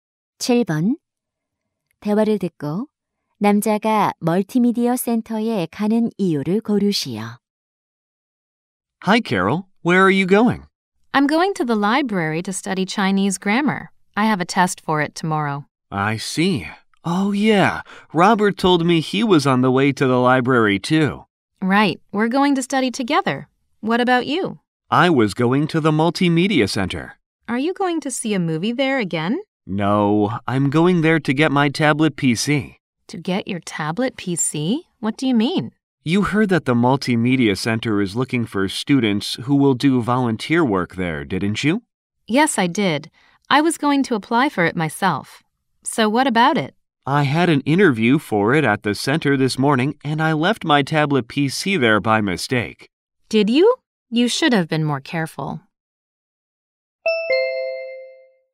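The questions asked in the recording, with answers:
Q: 대화를 듣고 남자가 멀티미디어 센터에 가는 이유를 고르시오.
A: 두고 온 태블릿 PC를 찾으려고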